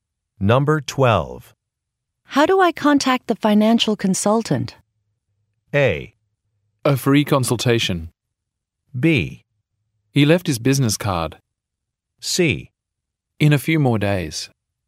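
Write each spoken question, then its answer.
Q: How do I contact the financial consultant?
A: B: He left his business card.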